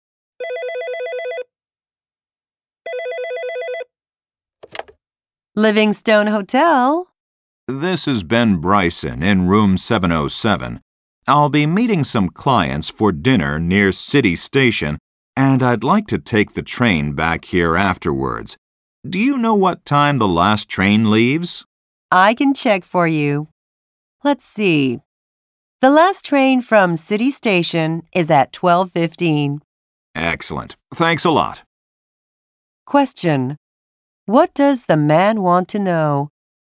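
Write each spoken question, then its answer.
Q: What does the man want to know?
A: What time the last train from City Station leaves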